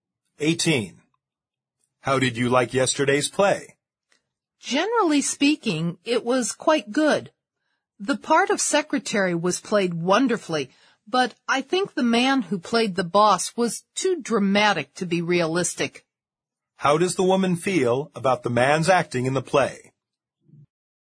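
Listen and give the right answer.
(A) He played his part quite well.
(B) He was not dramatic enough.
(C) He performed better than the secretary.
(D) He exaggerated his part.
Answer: (D) He exaggerated his part.

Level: 四级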